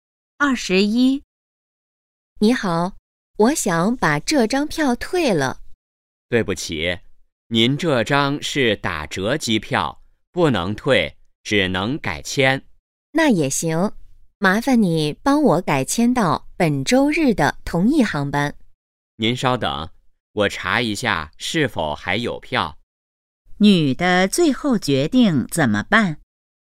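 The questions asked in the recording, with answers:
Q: 女的最后决定怎么办?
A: 改签到本周日的同一航班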